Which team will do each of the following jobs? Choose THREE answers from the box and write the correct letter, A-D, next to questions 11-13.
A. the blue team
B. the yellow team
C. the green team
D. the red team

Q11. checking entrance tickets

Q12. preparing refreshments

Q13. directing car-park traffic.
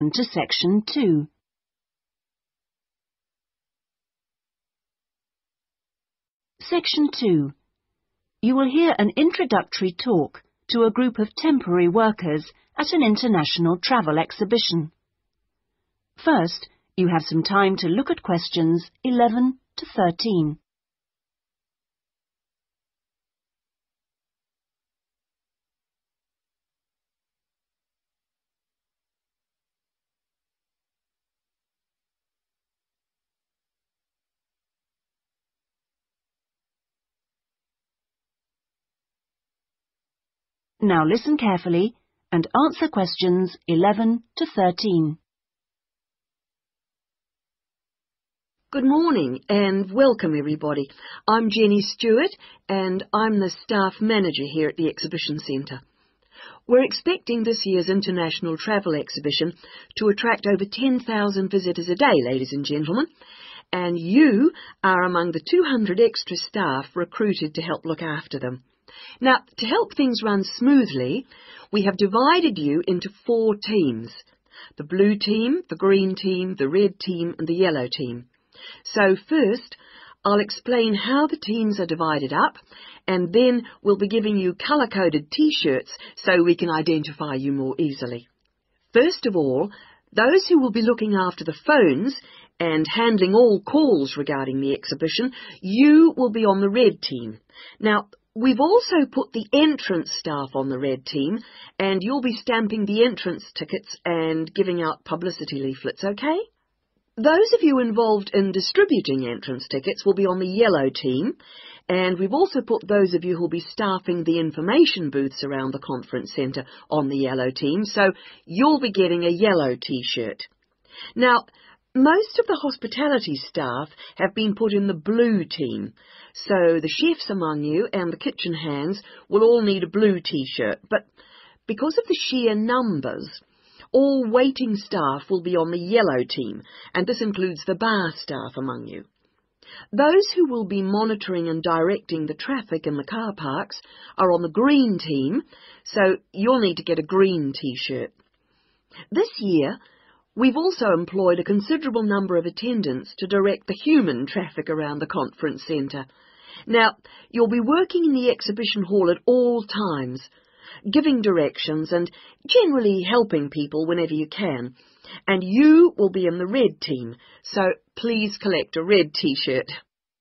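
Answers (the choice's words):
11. the red team
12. the blue team
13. the green team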